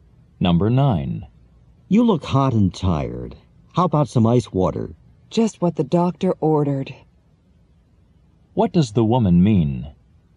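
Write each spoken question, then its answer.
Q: What does the woman mean?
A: The ice water is exactly what she wants.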